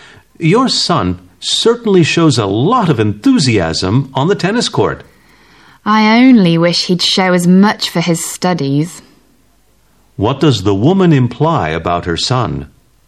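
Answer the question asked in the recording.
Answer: He isn't as enthusiastic about his studies as about tennis.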